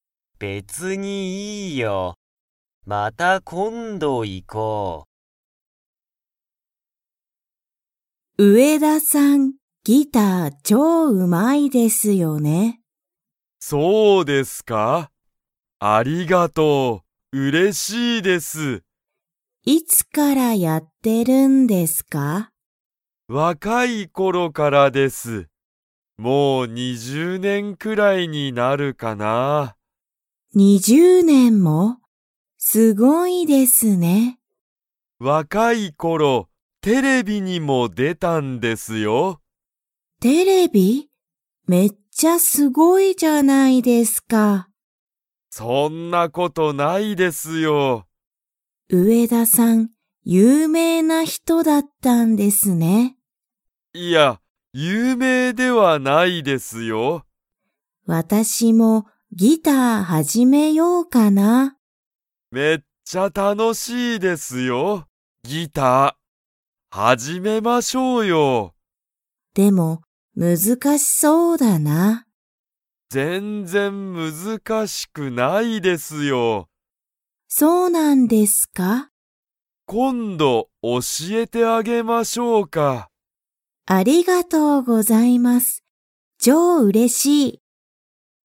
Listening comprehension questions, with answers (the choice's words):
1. 上田(うえだ)さんは若(わか)ころ、____に出(で)た。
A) 本(ほん)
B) 映画(えいが)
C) 店(みせ)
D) テレビ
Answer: テレビ

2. 上田(うえだ)さんは、橋本(はしもと)さんに今度(こんど)ギターを教(おし)えますか?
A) はい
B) いいえ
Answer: はい

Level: Level 2